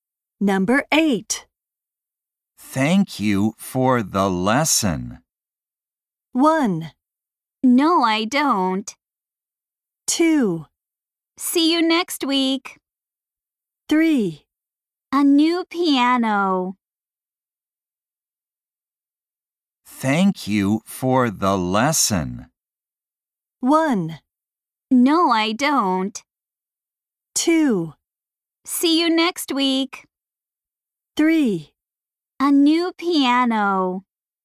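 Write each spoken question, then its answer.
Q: Thank you for the lesson.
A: 2: See you next week.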